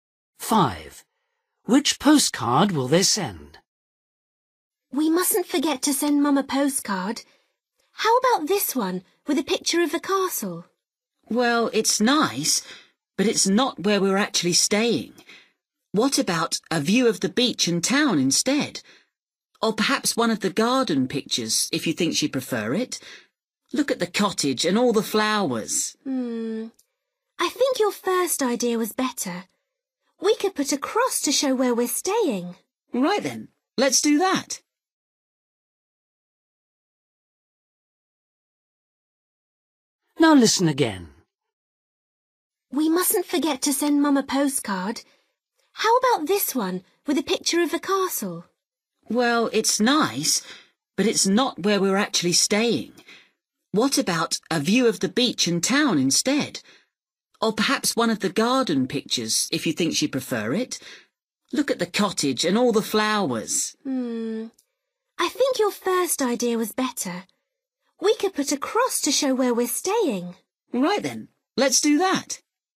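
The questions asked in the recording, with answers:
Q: Which postcard will they send?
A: The one with the castle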